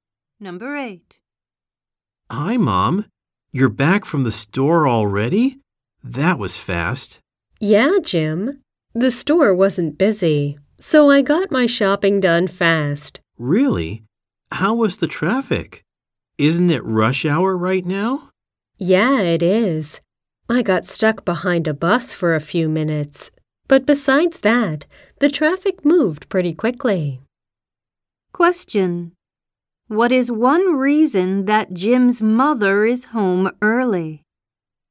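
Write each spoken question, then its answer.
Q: What is one reason that Jim's mother is home early?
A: The store wasn't busy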